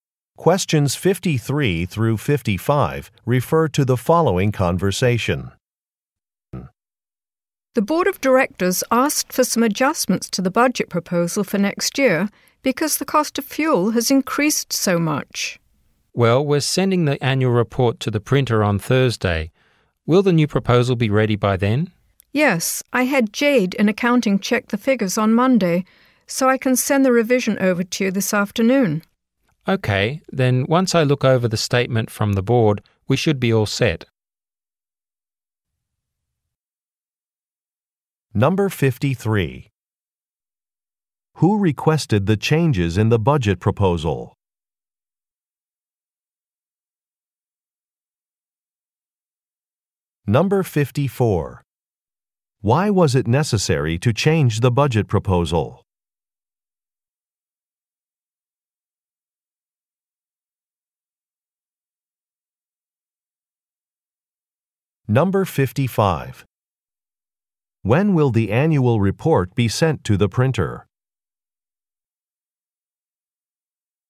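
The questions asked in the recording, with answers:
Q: Who requested the changes in the budget proposal?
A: The board of directors

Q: Why was it necessary to change the budget proposal?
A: Fuel costs had increased

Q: When will the annual report be sent to the printer?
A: On Thursday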